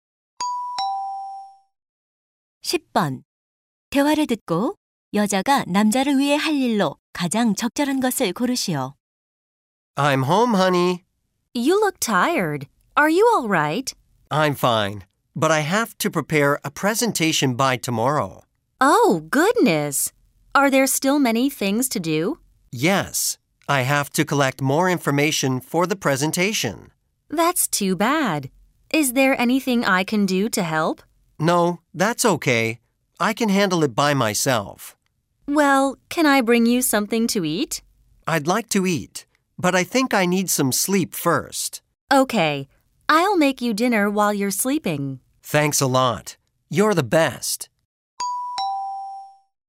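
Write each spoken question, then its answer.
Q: 대화를 듣고 여자가 남자를 위해 할 일로 가장 적절한 것을 고르시오.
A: 저녁 식사 준비하기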